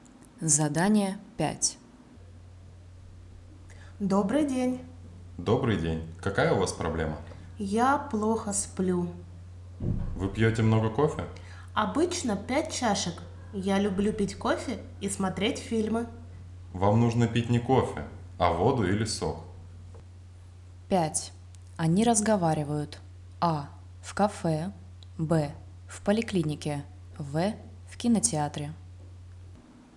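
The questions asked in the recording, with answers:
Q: Они разговаривают. А. В кафе. Б. В поликлинике. В. В кинотеатре.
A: Б: в поликлинике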